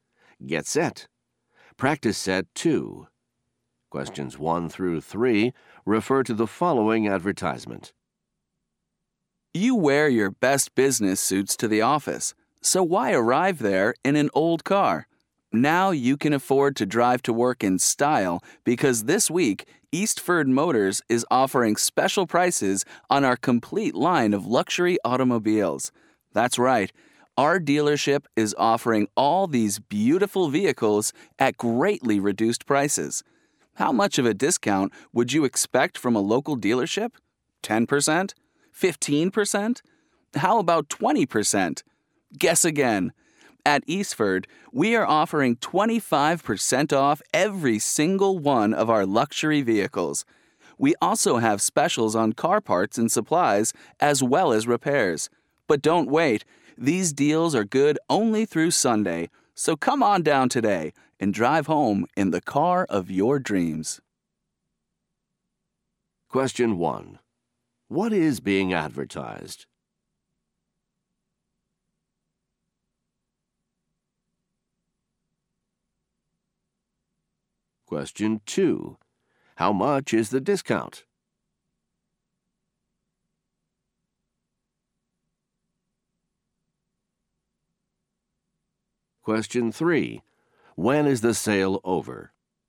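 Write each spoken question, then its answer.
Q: What is being advertised?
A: Luxury cars at a dealership

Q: How much is the discount?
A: 25%

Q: When is the sale over?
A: Sunday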